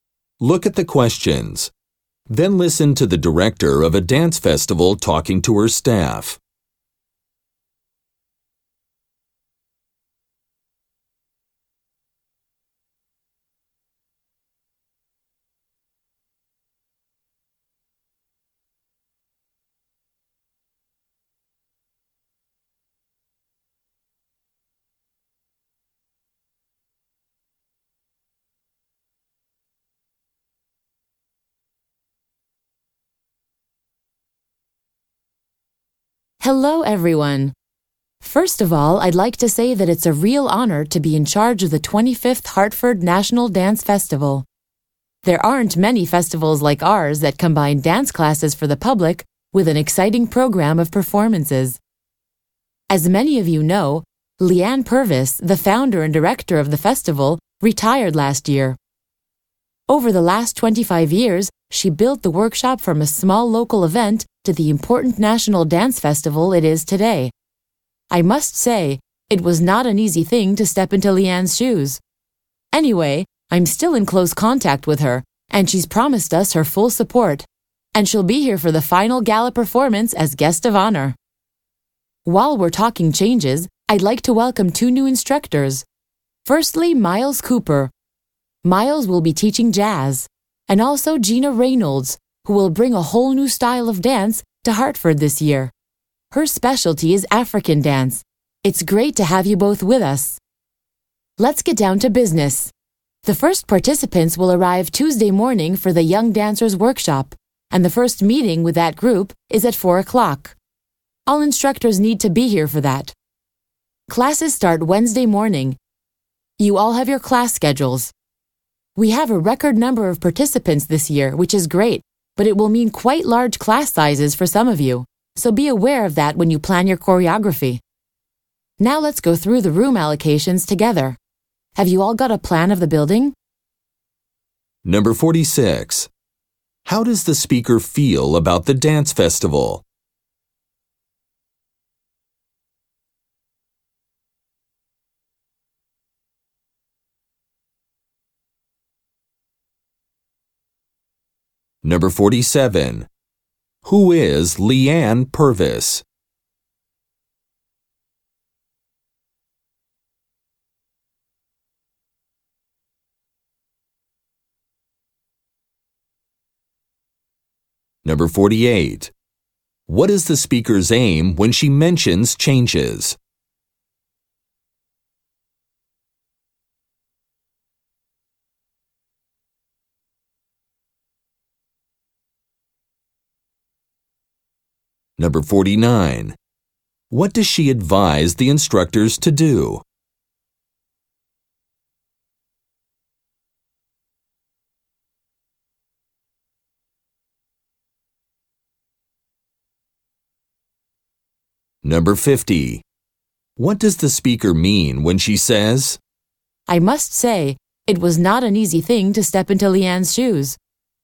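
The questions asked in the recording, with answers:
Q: How does the speaker feel about the dance festival?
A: Honored to be in charge of it

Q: Who is Leanne Purvis?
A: The founder and former director of the festival

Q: What is the speaker's aim when she mentions changes?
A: To introduce two new instructors

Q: What does she advise the instructors to do?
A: Plan their choreography for large class sizes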